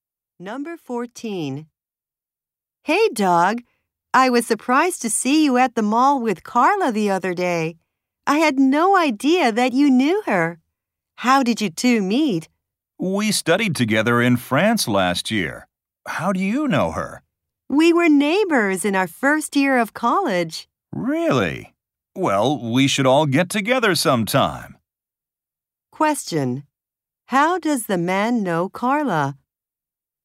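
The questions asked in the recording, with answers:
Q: How does the man know Carla?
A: They studied together in France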